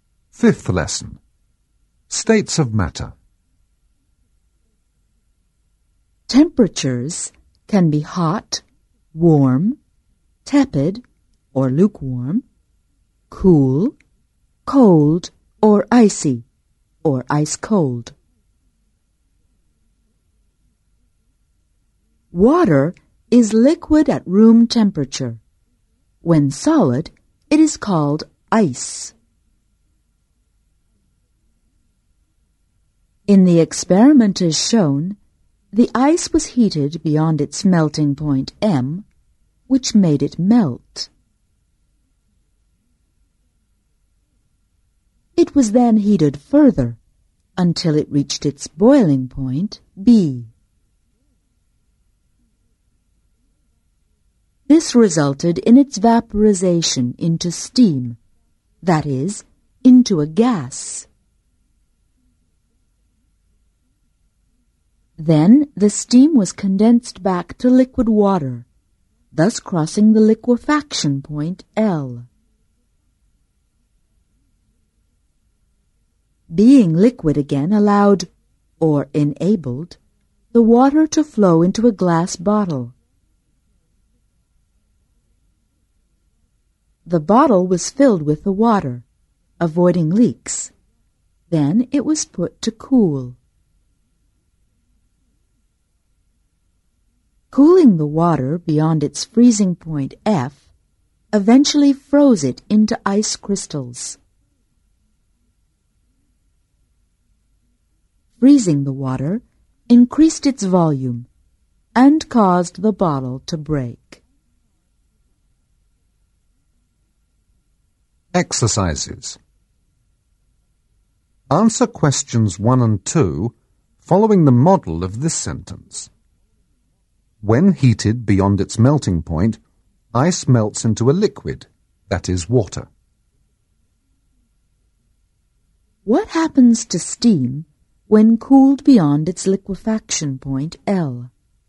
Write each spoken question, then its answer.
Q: What happens to steam when cooled beyond its liquefaction point, L?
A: When cooled beyond its liquefaction point, L, steam condenses into a liquid, that is, water.